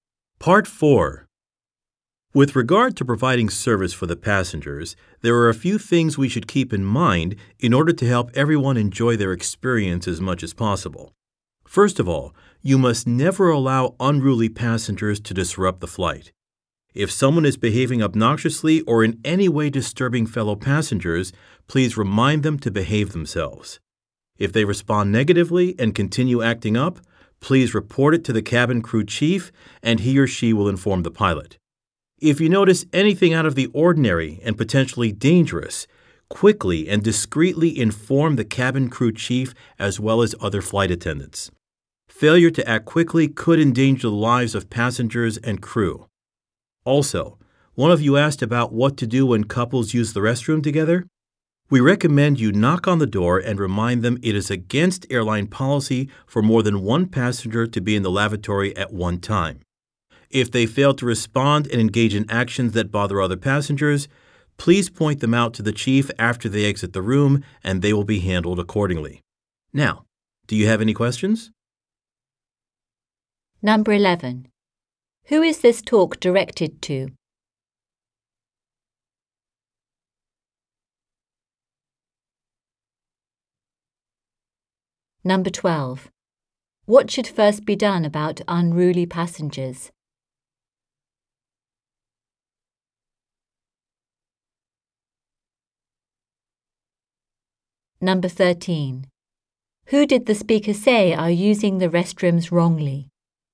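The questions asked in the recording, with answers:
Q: Who is this talk directed to?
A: Flight attendants

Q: What should first be done about unruly passengers?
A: Remind them to behave themselves

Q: Who did the speaker say are using the restrooms wrongly?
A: Couples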